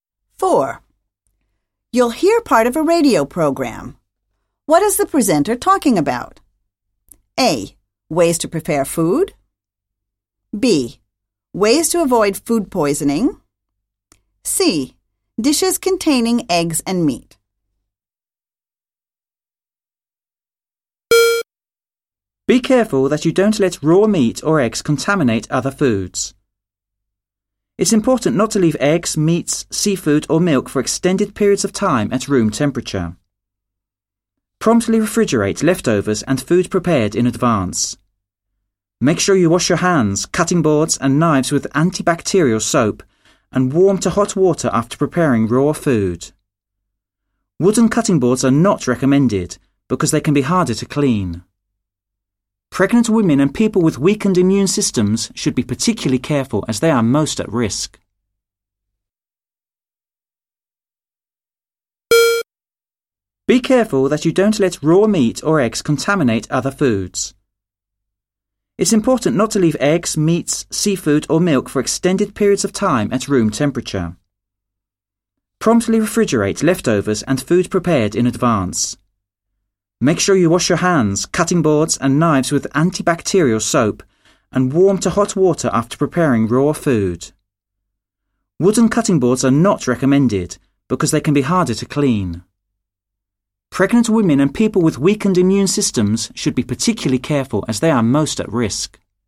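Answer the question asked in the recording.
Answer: B: Ways to avoid food poisoning.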